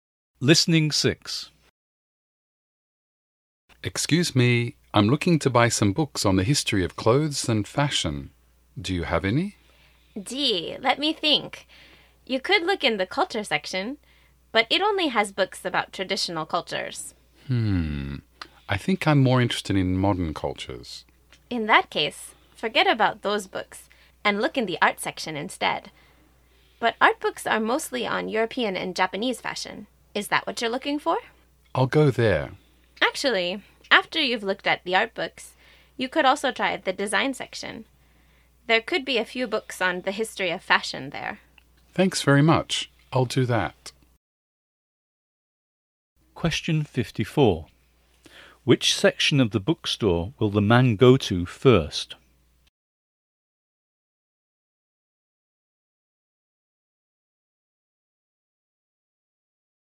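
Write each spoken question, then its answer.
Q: Which section of the bookstore will the man go to first?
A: The art section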